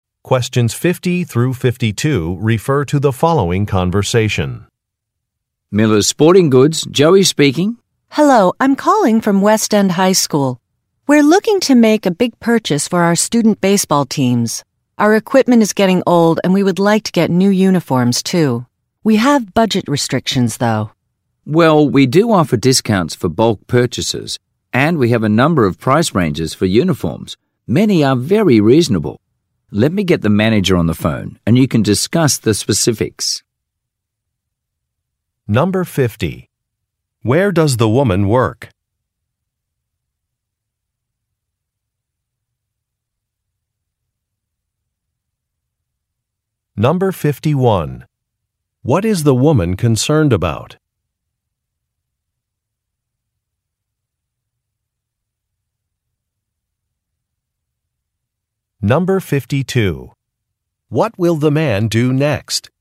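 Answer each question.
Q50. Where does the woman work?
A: At a school

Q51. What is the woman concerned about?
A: Overall costs

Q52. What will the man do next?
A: Call a manager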